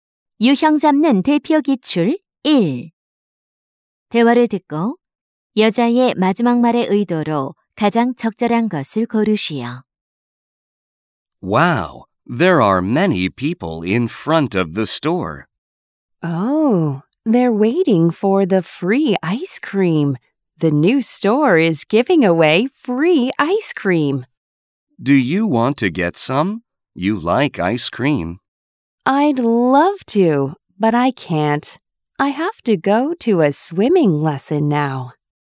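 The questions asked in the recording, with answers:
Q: 대화를 듣고 여자의 마지막 말의 의도로 가장 적절한 것을 고르시오.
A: 거절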